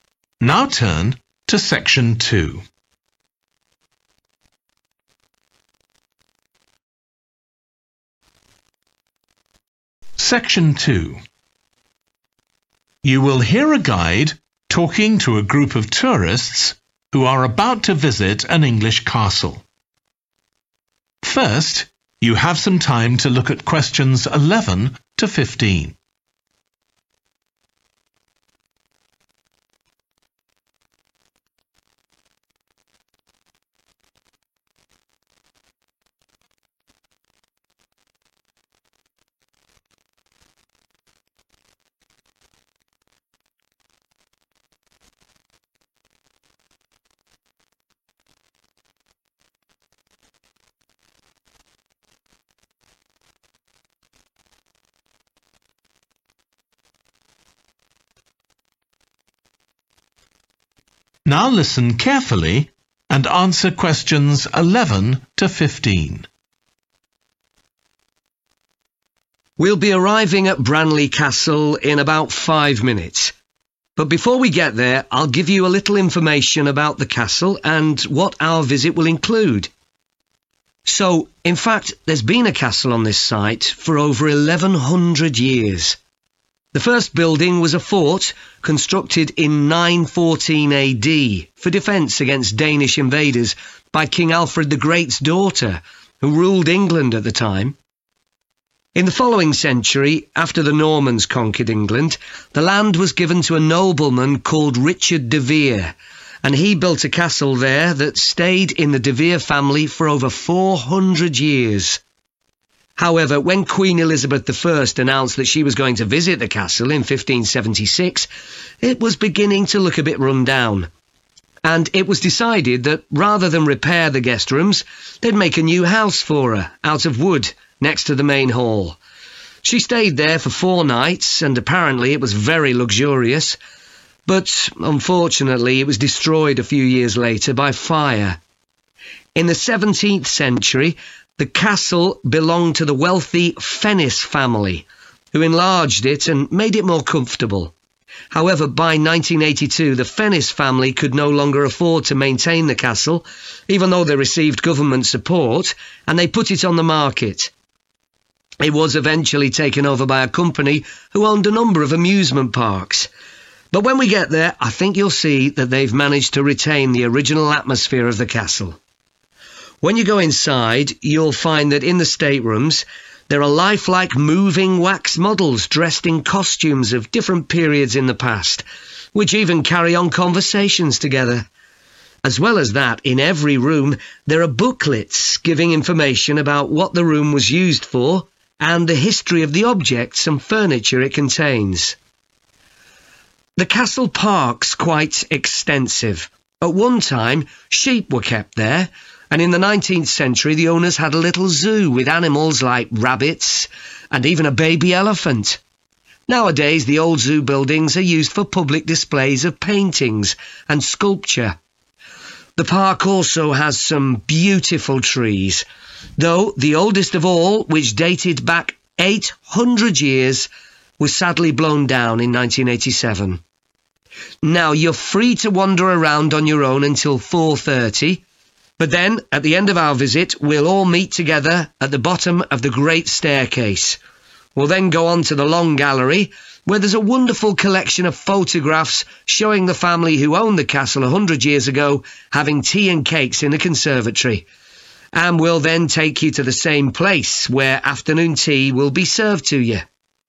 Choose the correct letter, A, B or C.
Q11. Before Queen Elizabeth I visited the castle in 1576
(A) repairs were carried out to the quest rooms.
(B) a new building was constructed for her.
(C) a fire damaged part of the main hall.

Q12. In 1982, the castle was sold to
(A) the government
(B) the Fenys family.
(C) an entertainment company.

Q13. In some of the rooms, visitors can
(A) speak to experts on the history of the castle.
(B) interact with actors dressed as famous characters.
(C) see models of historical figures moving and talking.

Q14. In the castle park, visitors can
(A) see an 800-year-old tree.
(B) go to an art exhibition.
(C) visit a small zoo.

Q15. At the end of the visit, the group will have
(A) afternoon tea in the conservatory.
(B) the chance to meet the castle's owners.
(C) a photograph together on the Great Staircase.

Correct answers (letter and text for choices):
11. (B) a new building was constructed for her.
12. (C) an entertainment company.
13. (C) see models of historical figures moving and talking.
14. (B) go to an art exhibition.
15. (A) afternoon tea in the conservatory.